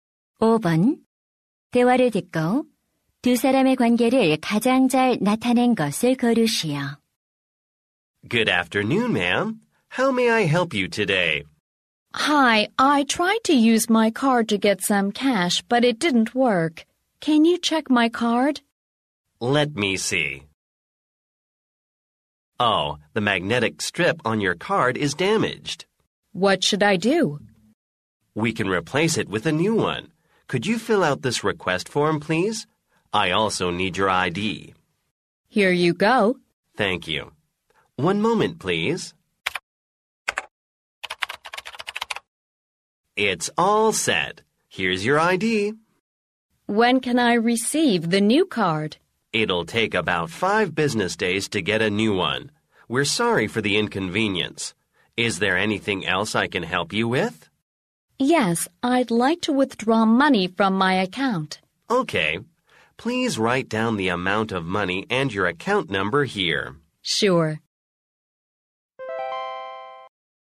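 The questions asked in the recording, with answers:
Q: 대화를 듣고 두 사람의 관계를 가장 잘 나타낸 것을 고르시오.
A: 은행 직원 - 고객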